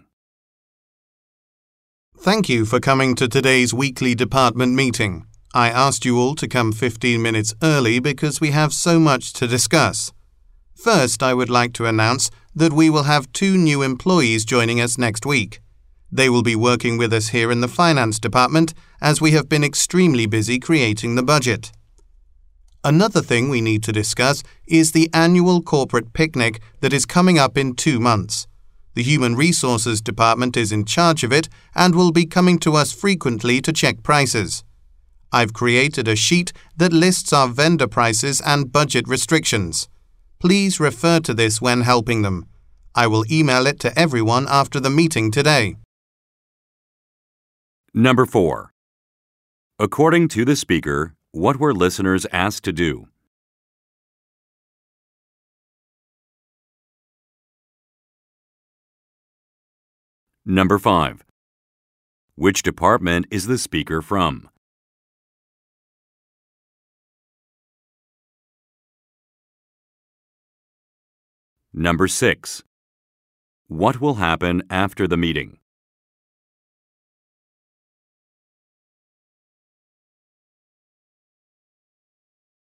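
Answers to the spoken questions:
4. Come to the meeting 15 minutes early
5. The finance department
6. The speaker will email a sheet of vendor prices and budget restrictions to everyone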